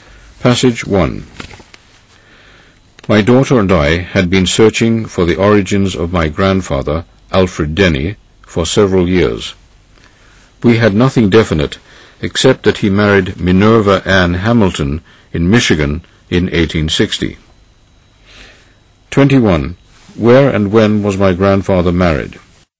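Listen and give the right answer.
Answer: In Michigan in 1860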